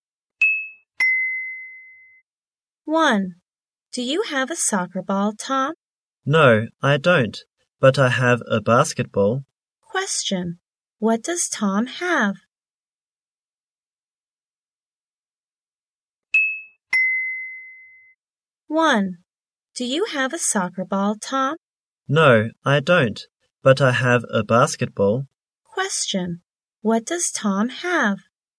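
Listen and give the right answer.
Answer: A basketball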